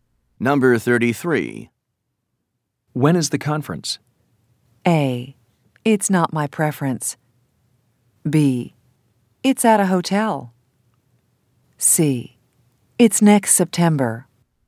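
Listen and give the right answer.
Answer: C: It's next September.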